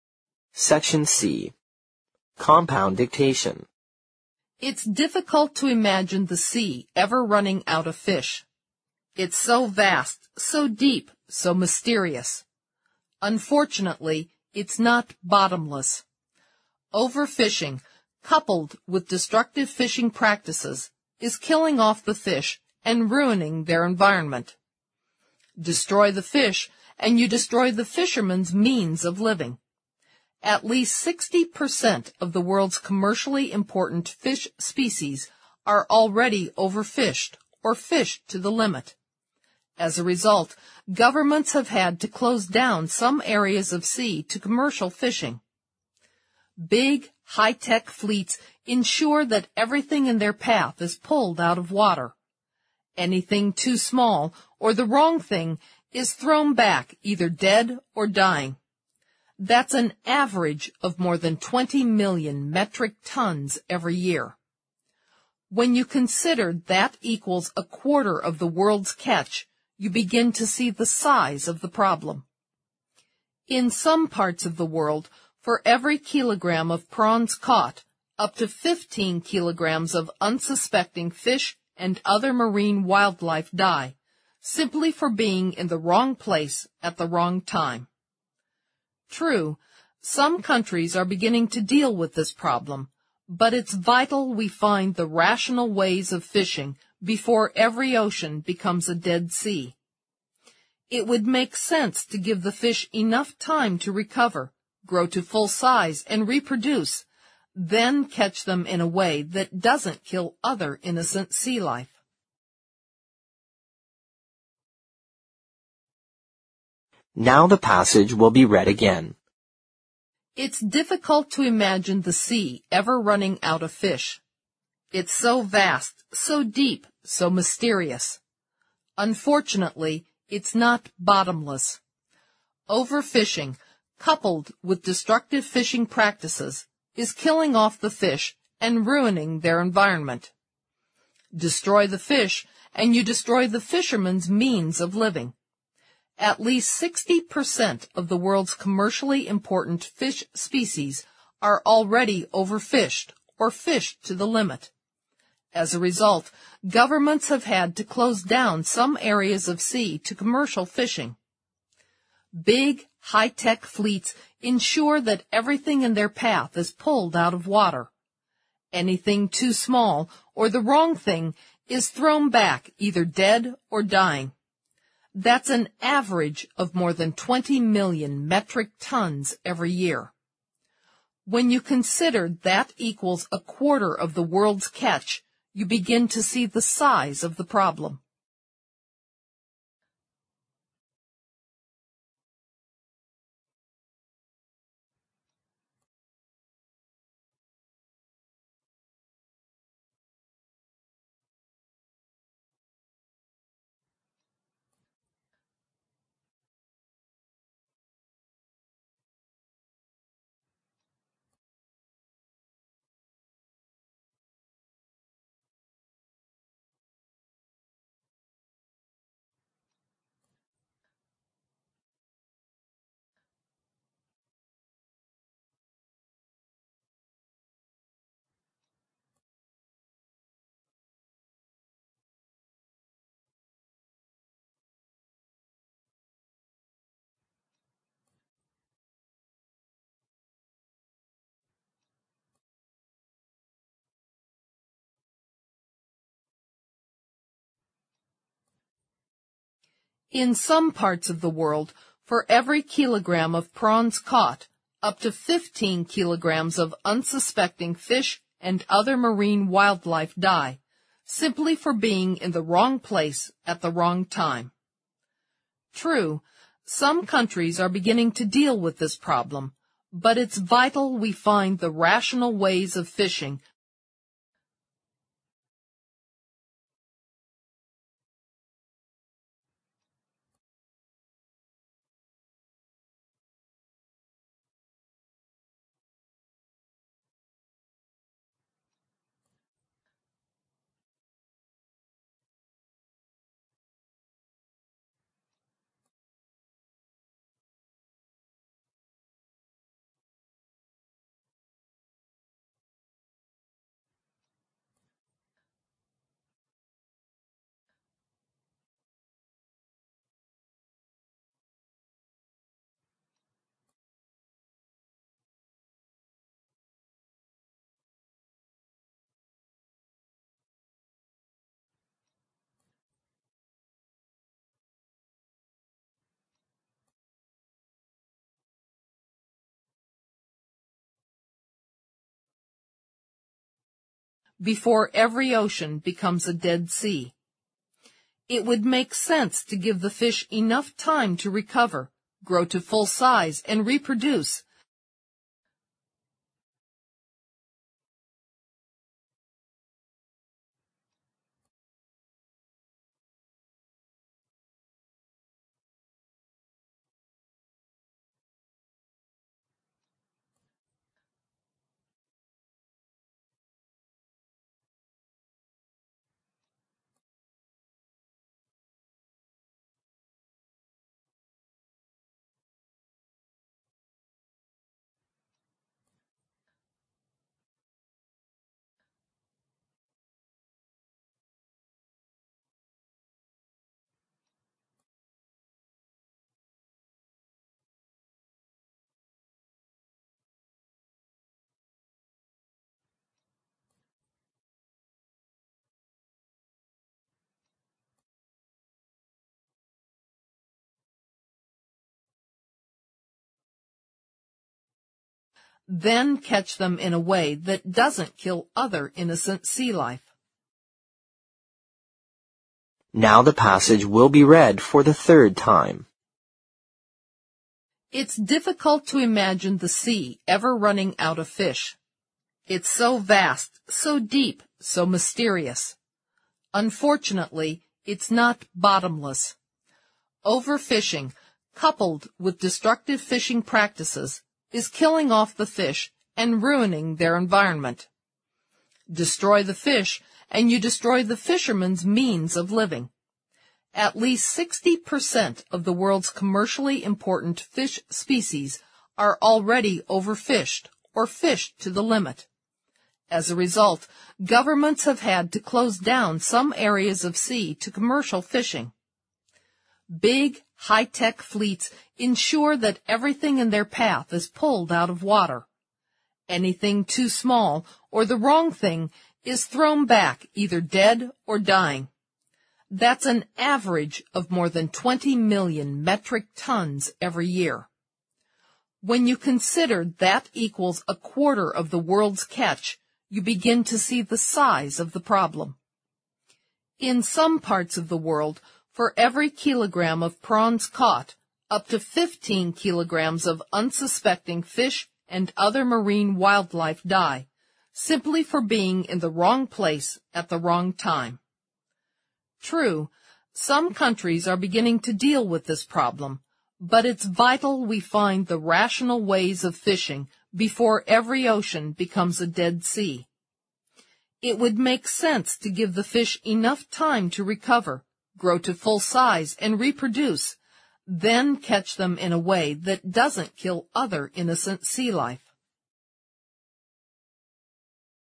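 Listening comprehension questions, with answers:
Section C Compound Dictation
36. It's so vast, so deep, so (36) ______ .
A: mysterious

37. Over-fishing, (37) ______ with destructive fishing practices, is killing off the fish and (38) ______ their environment.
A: coupled

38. Over-fishing, (37) ______ with destructive fishing practices, is killing off the fish and (38) ______ their environment.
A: ruining

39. Destroy the fish, and you destroy the fishermen's (39) ______ of living.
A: means

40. At least 60 (40) ______ of the world's commercially important fish (41) ______ are already over- fished, or fished to the limit.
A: percent

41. At least 60 (40) ______ of the world's commercially important fish (41) ______ are already over- fished, or fished to the limit.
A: species

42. Big, high-tech fleets (42) ______ that everything in their path is pulled out of water.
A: ensure

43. That's an (43) ______ of more than 20 million metric tons every year.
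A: average

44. (44) _____________________________________________________________________ .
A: When you consider that equals a quarter of the world's catch, you begin to see the size of the problem

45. True, (45) ___________________________________________________________________ , before every ocean becomes a dead sea.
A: some countries are beginning to deal with this problem, but it's vital we find the rational ways of fishing

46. (46) ________________________________________________________________________ , then catch them in a way that doesn't kill other innocent sea life.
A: It would make sense to give the fish enough time to recover, grow to full size, and reproduce

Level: 四级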